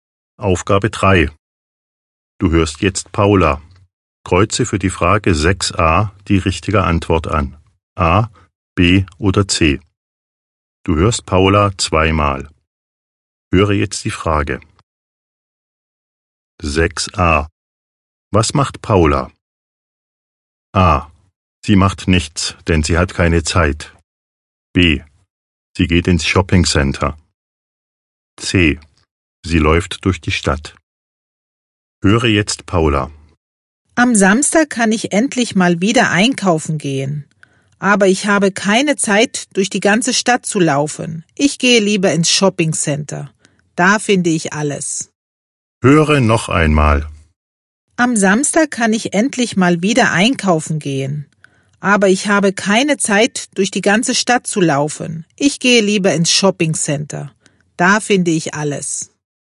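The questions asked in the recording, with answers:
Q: Was macht Paula?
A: B: Sie geht ins Shopping Center.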